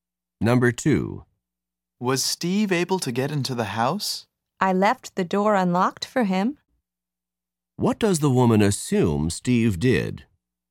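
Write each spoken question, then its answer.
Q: What does the woman assume Steve did?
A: He got into the house through the unlocked door.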